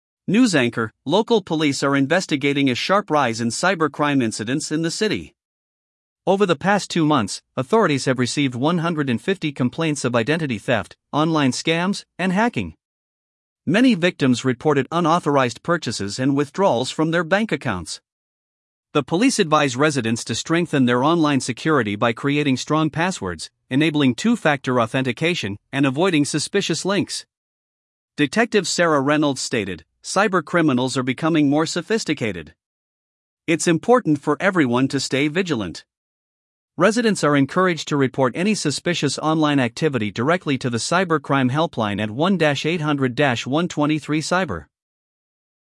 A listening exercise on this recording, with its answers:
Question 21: What type of crime is being discussed?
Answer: Cybercrime

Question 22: How many complaints have been reported in two months?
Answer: 150 complaints

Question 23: What advice did the police provide to residents?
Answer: Strengthen passwords, enable two-factor authentication

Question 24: Who is Detective Sarah Reynolds?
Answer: A police detective

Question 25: What is the Cybercrime Helpline number?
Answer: 1-800-123-CYBER

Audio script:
News Anchor: Local police are investigating a sharp rise in cybercrime incidents in the city. Over the past two months, authorities have received 150 complaints of identity theft, online scams, and hacking. Many victims reported unauthorized purchases and withdrawals from their bank accounts.
The police advise residents to strengthen their online security by creating strong passwords, enabling two-factor authentication, and avoiding suspicious links.
Detective Sarah Reynolds stated, "Cybercriminals are becoming more sophisticated. It's important for everyone to stay vigilant." Residents are encouraged to report any suspicious online activity directly to the Cybercrime Helpline at 1-800-123-CYBER.